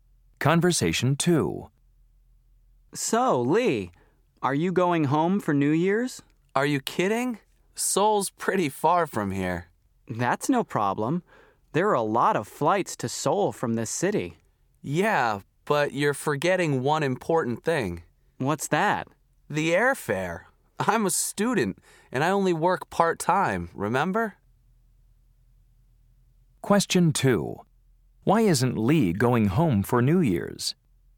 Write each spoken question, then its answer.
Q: Why isn't Lee going home for New Year's?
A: Almost $1,000. That's too much money for me.